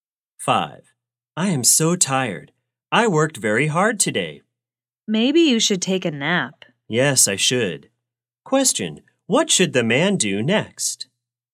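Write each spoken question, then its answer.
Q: Question, what should the man do next?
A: Take a nap.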